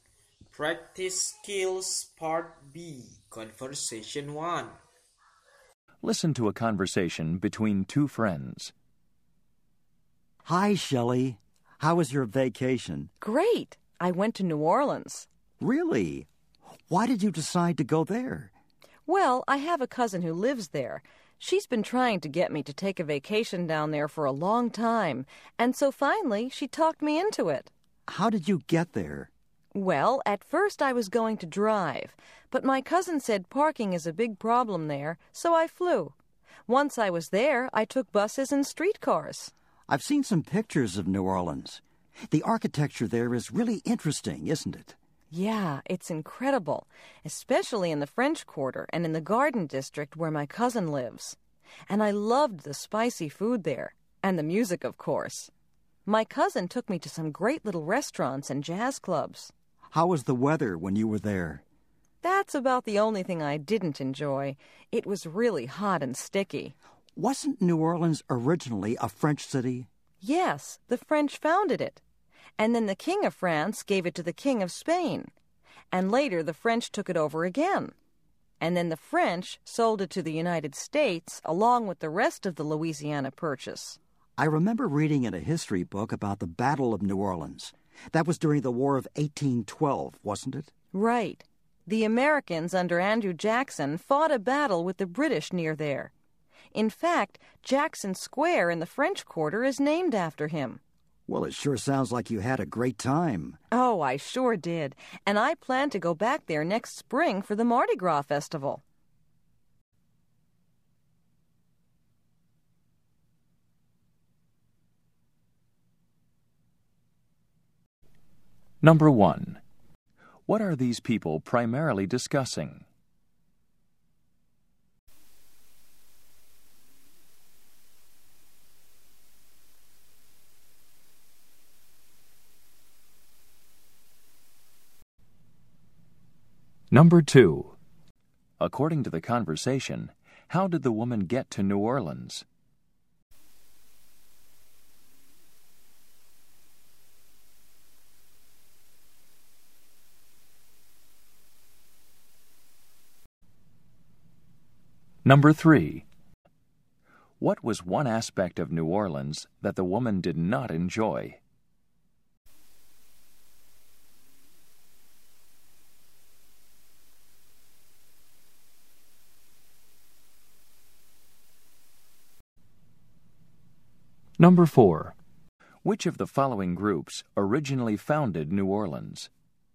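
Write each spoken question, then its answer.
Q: What are these people primarily discussing?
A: The woman's vacation in New Orleans

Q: According to the conversation, how did the woman get to New Orleans?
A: She flew

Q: What was one aspect of New Orleans that the woman did not enjoy?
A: The hot, sticky weather

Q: Which of the following groups originally founded New Orleans?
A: The French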